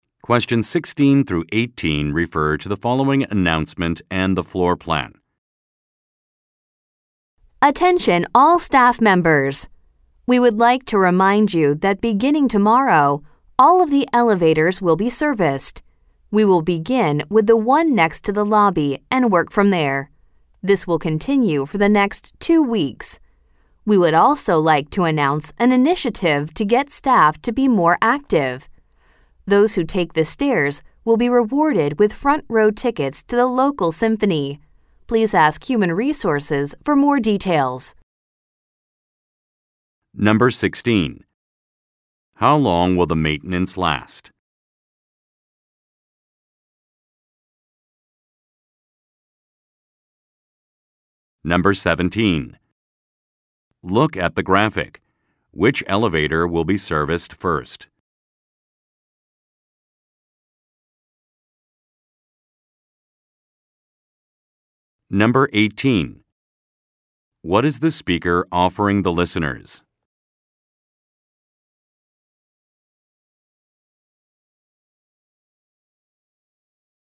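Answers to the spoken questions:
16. 2 weeks
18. Front row tickets to the local symphony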